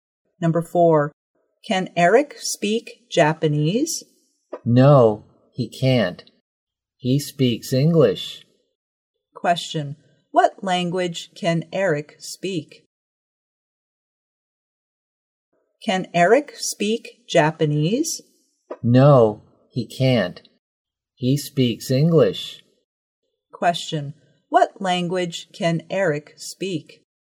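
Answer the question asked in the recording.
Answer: English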